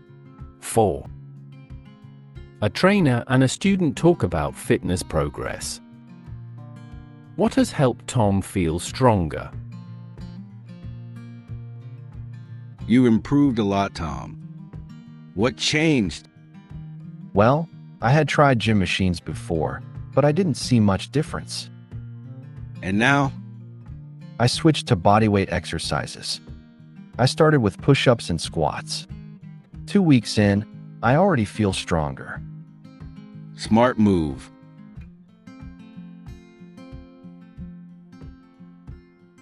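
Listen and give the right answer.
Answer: Switching to bodyweight exercises.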